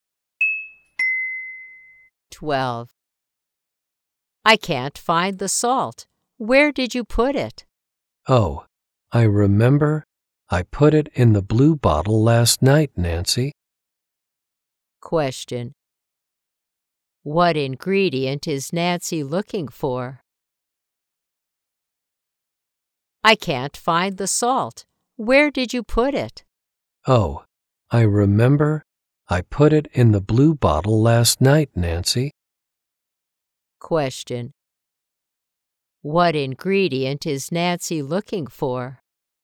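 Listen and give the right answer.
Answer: Salt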